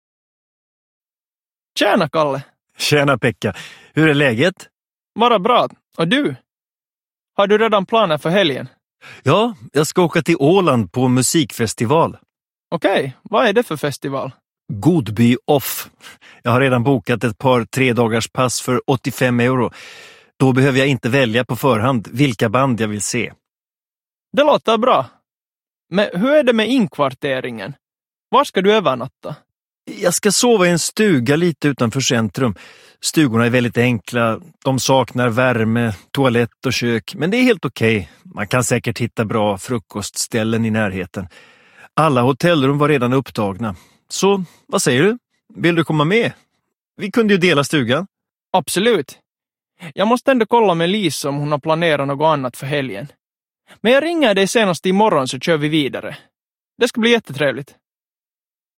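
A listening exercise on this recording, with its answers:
Lyssna på fyra korta dialoger. Du hör dialogerna en gång. Besvara frågorna efter varje dialog.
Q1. Vilken typ av biljett har Pekka köpt? (3 p.)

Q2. Var ska han bo under resan? (3 p.)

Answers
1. Ett tredagarspass till festivalen för 85 euro
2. I en enkel stuga lite utanför centrum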